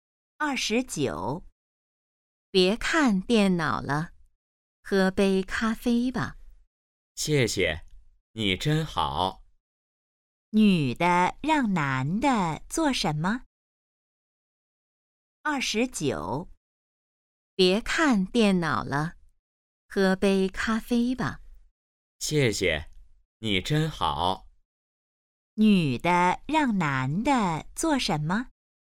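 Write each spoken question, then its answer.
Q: 女的让男的做什么?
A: 喝杯咖啡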